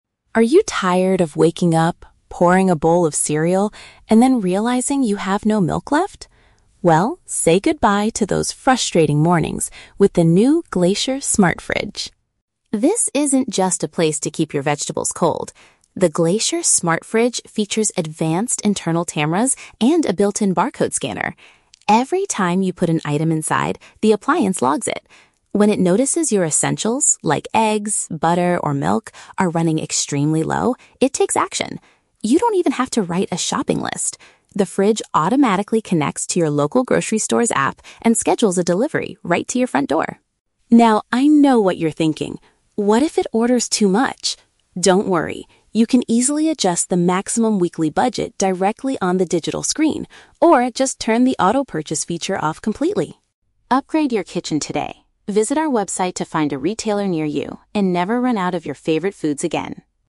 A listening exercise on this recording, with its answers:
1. How does the machine identify the products placed inside?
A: It uses visual equipment and reads product codes.

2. What does the appliance do when household staples are almost empty?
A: It buys replacements from a nearby market without your help.

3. What can owners do to prevent the device from spending too much money?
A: They can set a financial limit using the monitor.

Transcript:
Voice-over: Are you tired of waking up, pouring a bowl of cereal, and then realizing you have no milk left? Well, say goodbye to those frustrating mornings with the new Glacier Smart Fridge.
This isn't just a place to keep your vegetables cold. The Glacier Smart Fridge features advanced internal cameras and a built-in barcode scanner. Every time you put an item inside, the appliance logs it. When it notices your essentials—like eggs, butter, or milk—are running extremely low, it takes action. You don't even have to write a shopping list! The fridge automatically connects to your local grocery store's app and schedules a delivery right to your front door.
Now, I know what you're thinking: "What if it orders too much?" Don't worry. You can easily adjust the maximum weekly budget directly on the digital screen, or just turn the auto-purchase feature off completely.
Upgrade your kitchen today. Visit our website to find a retailer near you and never run out of your favorite foods again!